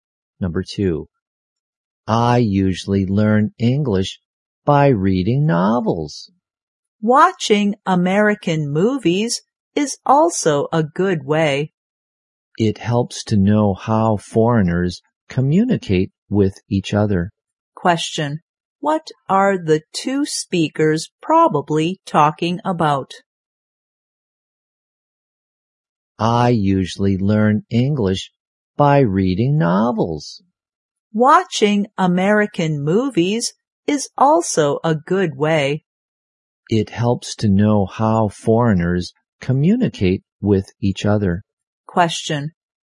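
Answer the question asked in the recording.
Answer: Ways of learning English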